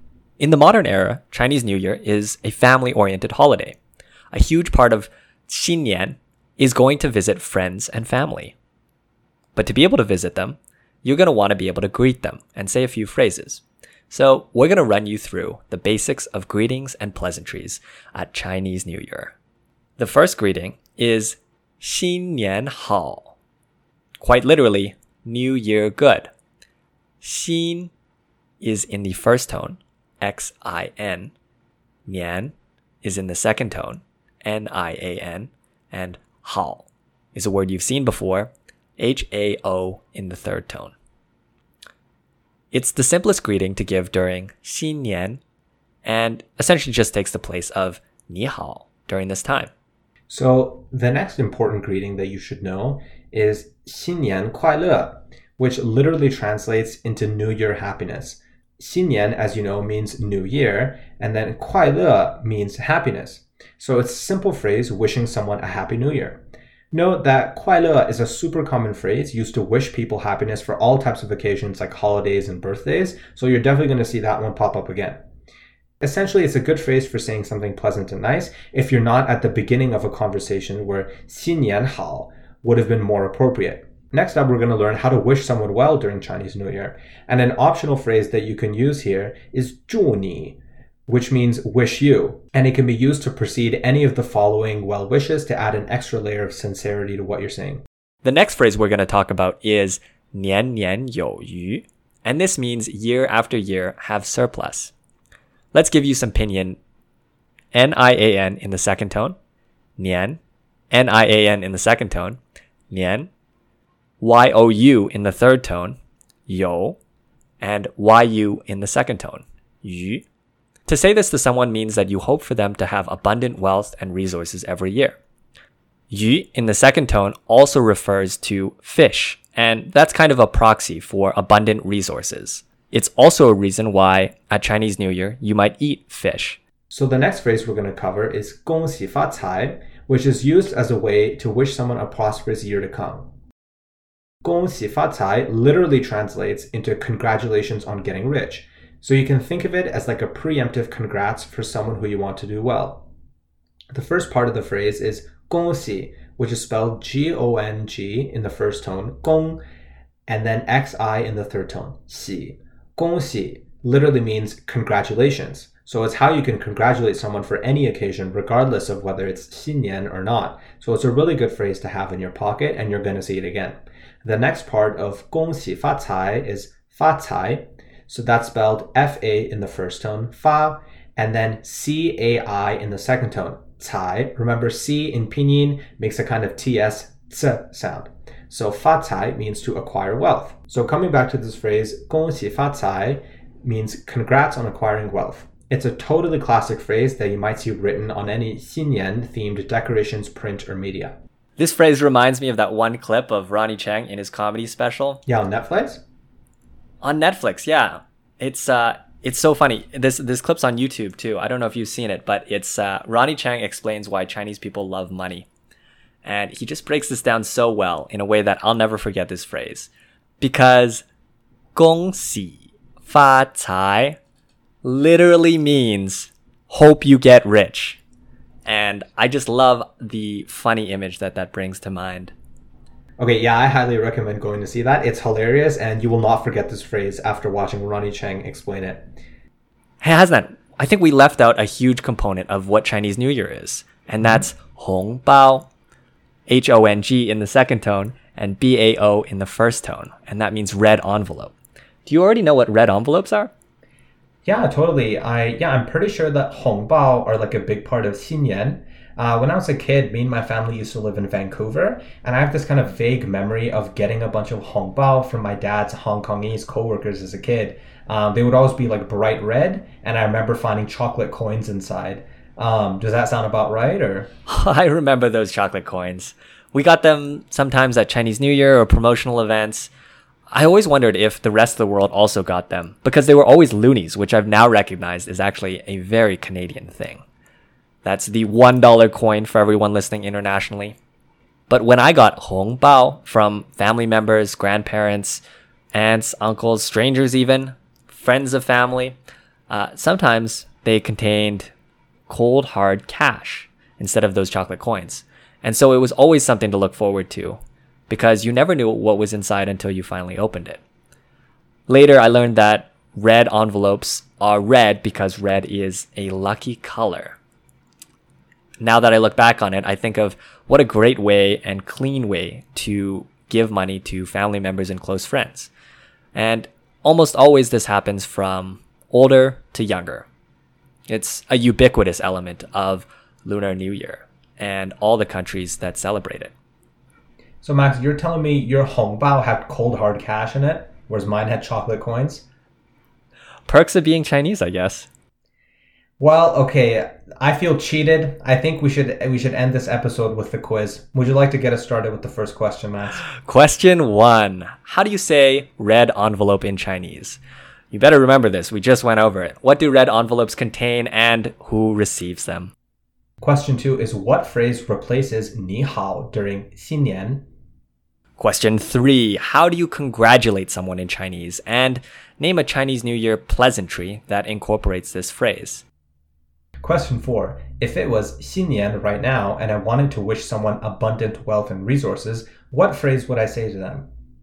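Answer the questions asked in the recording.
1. 红包 (hóngbāo)
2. Money (cash, or sometimes chocolate coins); usually given by older people to younger family members and close friends
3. 新年好
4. 恭喜 (gōngxǐ)
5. 恭喜发财
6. 年年有余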